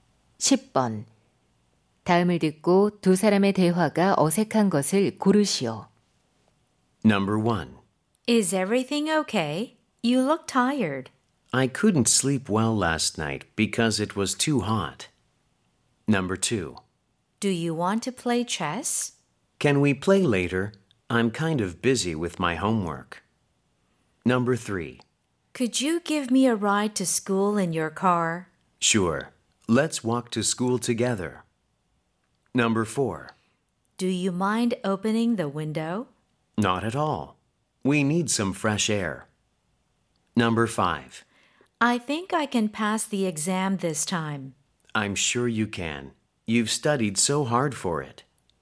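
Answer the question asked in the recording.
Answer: 3: Could you give me a ride to school in your car? / Sure. Let's walk to school together.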